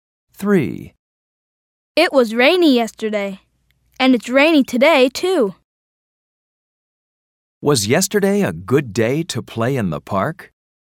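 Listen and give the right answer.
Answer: No, it was rainy.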